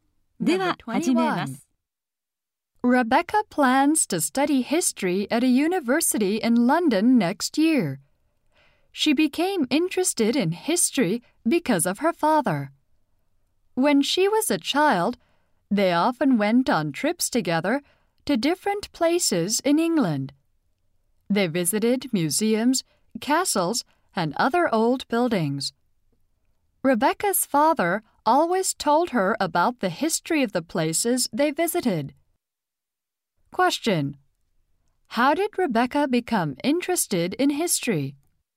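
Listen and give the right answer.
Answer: Through trips with her father, who told her about the history of places.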